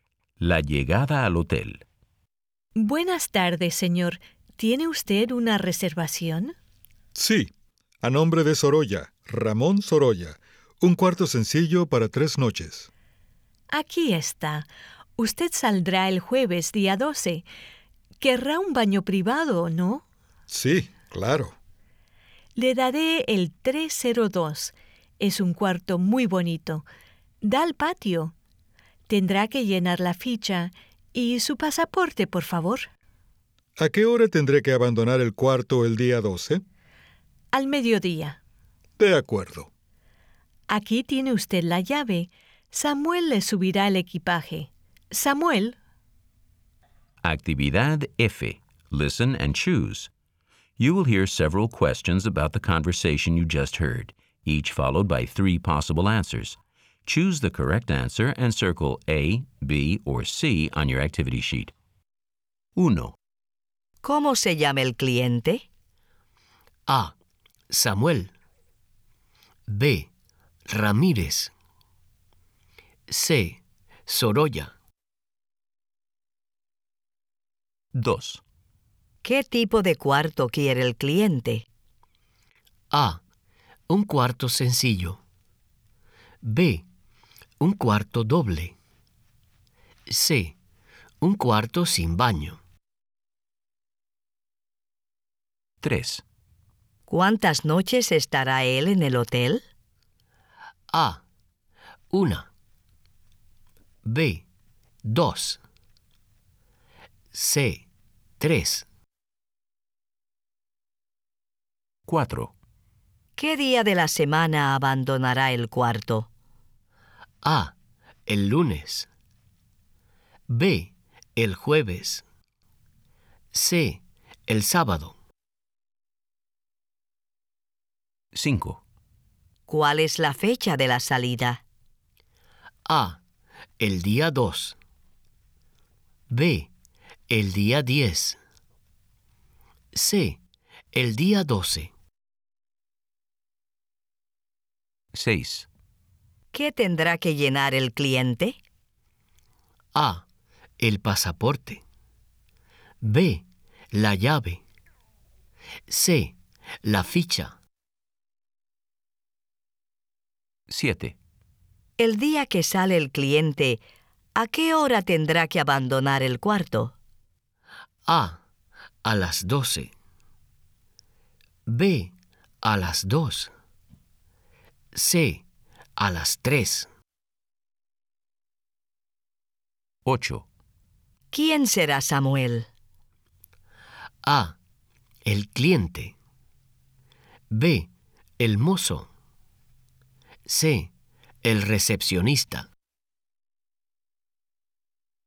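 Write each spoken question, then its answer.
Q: ¿Cómo se llama el cliente?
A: C: Sorolla.

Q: ¿Qué tipo de cuarto quiere el cliente?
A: A: Un cuarto sencillo.

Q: ¿Cuántas noches estará él en el hotel?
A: C: 3.

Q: ¿Qué día de la semana abandonará el cuarto?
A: B: El jueves.

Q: ¿Cuál es la fecha de la salida?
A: C: El día 12.

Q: ¿Qué tendrá que llenar el cliente?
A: C: La ficha.

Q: El día que sale el cliente, ¿a qué hora tendrá que abandonar el cuarto?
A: A: A las 12.

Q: ¿Quién será Samuel?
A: B: El mozo.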